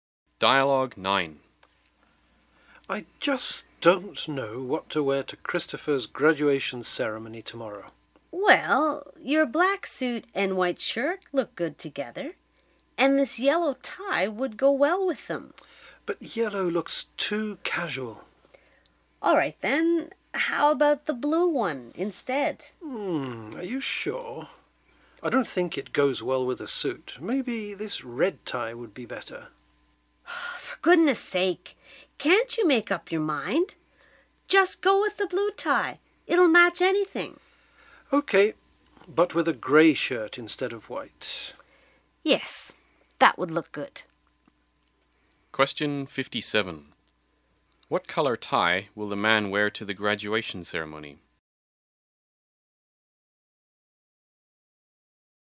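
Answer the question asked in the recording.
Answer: Blue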